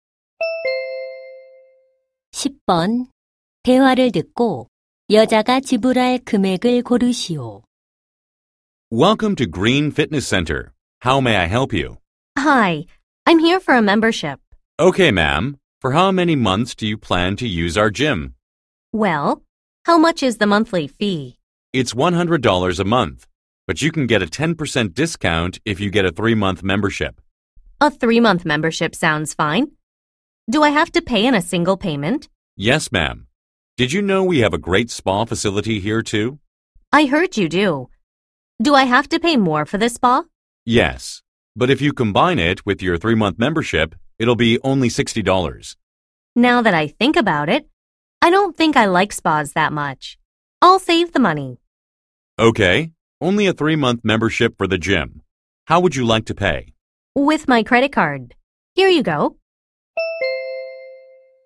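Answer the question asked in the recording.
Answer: $270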